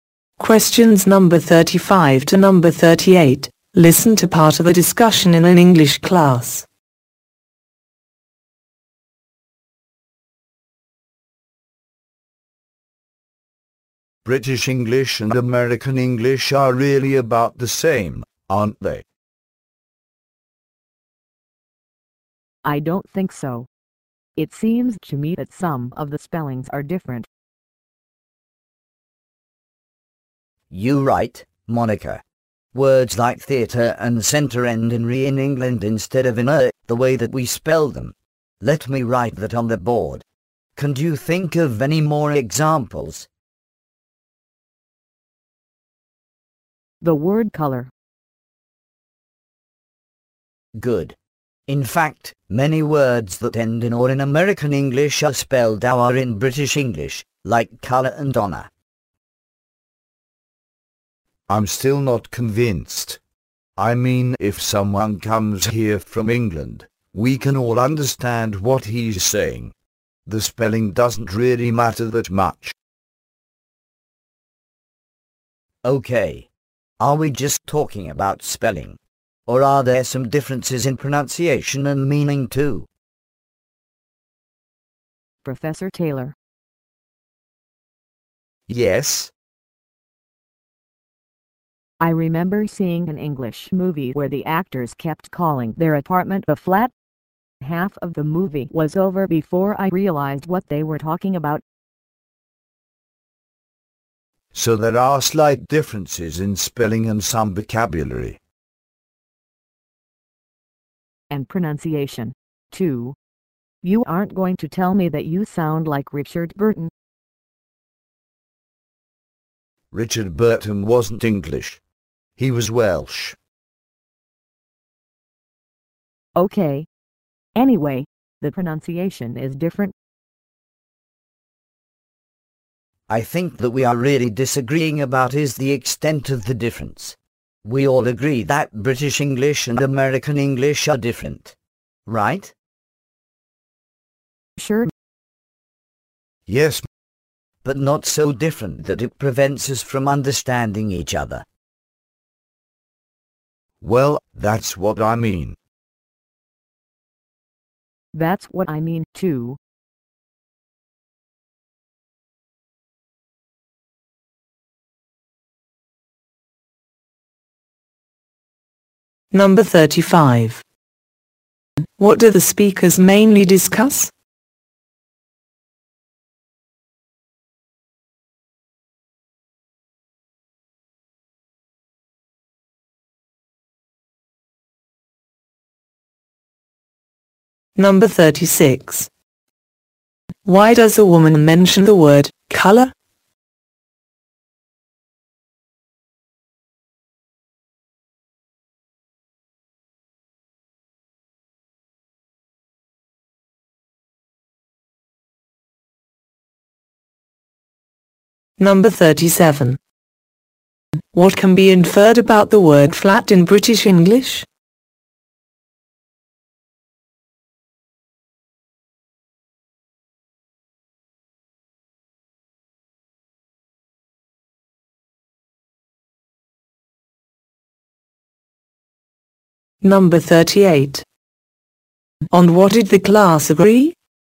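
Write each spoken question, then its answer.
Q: What do the speakers mainly discuss?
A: Differences between British and American English.

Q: Why does a woman mention the word color?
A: As an example of a spelling difference.

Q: What can be inferred about the word flat in British English?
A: It means apartment.

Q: On what did the class agree?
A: British and American English differ, but not enough to prevent understanding.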